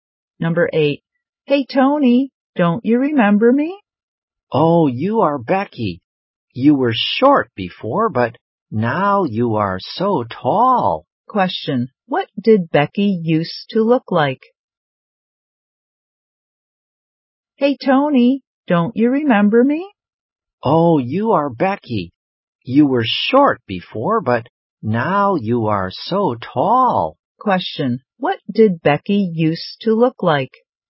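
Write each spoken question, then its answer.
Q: What did Becky used to look like?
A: Short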